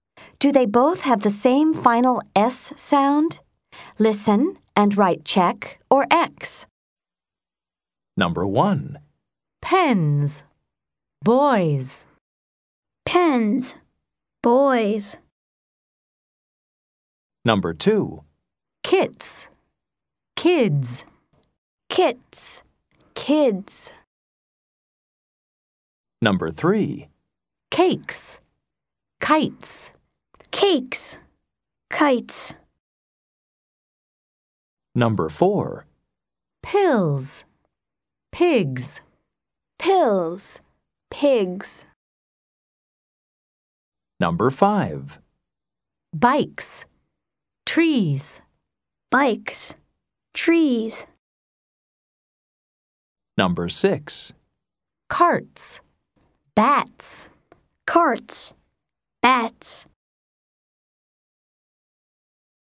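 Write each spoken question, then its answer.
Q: Do they both have the same final S sound?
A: Yes (check): pens, boys both /z/

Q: Do they both have the same final S sound?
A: No (X): kits /s/, kids /z/

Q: Do they both have the same final S sound?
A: Yes (check): cakes, kites both /s/

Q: Do they both have the same final S sound?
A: Yes (check): pills, pigs both /z/

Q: Do they both have the same final S sound?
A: No (X): bikes /s/, trees /z/

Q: Do they both have the same final S sound?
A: Yes (check): carts, bats both /s/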